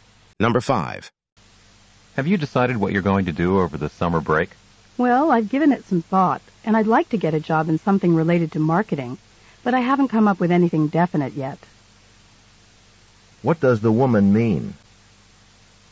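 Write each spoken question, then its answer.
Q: What does the woman mean?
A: She hasn't made definite summer plans yet, but she wants a marketing-related job.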